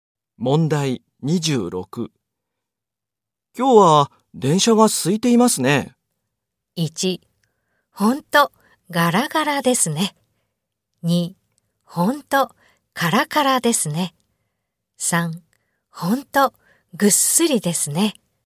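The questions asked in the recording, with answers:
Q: 今日は電車が空いていますね。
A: 1: ほんと、ガラガラですね。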